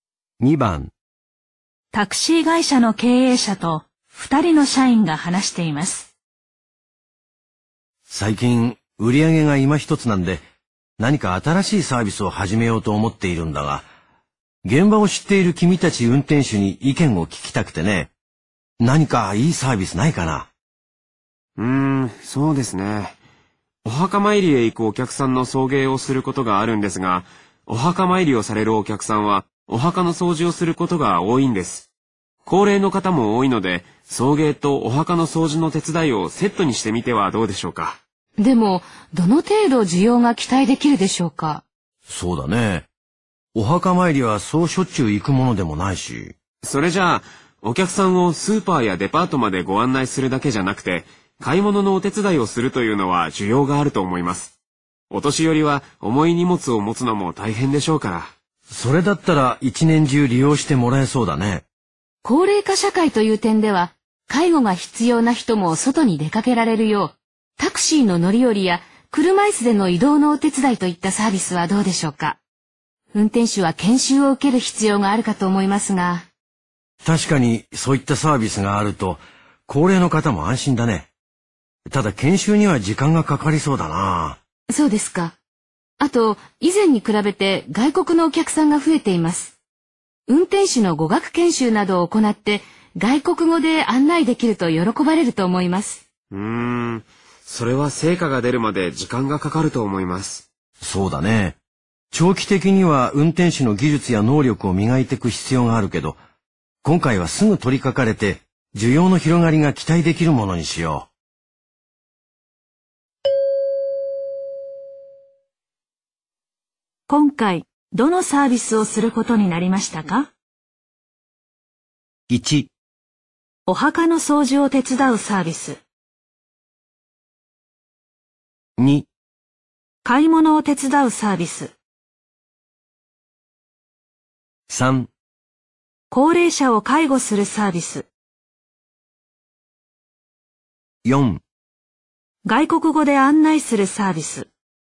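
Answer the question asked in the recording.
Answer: 2: 買い物を手伝うサービス。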